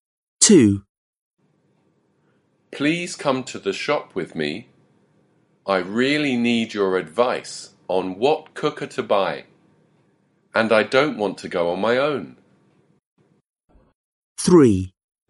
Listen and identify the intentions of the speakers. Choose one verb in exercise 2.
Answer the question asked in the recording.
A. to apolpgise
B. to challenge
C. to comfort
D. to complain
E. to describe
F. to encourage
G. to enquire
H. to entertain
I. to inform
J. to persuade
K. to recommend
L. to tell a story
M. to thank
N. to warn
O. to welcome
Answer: J. to persuade

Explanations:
Please come to the shop with me. I really need your advice on what cooker to buy. And I don't want to go on my own.

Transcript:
2. Please come to the shop with me. I really need your advice on what cooker to buy. And I don't want to go on my own.

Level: Lớp 10